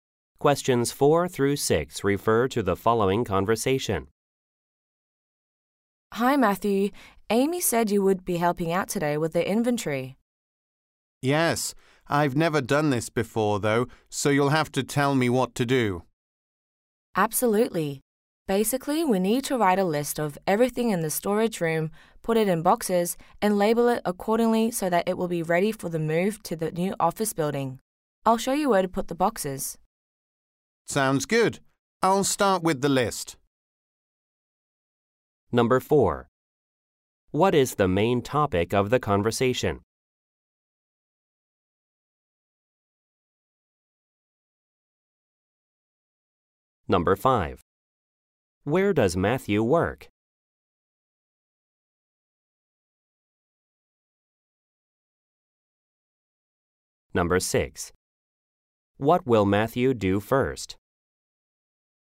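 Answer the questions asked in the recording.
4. Doing the inventory for the move to a new office
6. Start with the list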